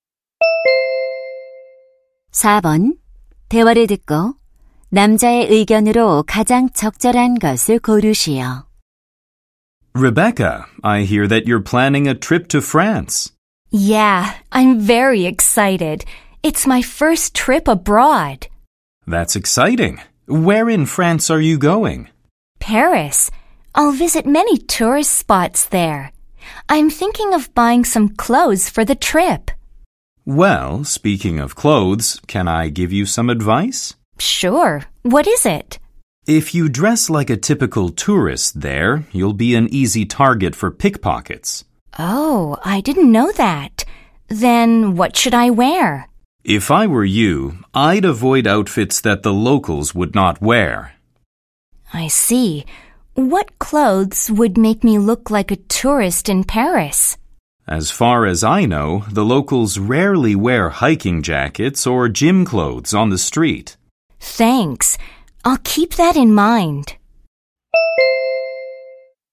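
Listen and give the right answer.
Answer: 소매치기를 피하려면 여행지에서 현지인처럼 옷을 입어야 한다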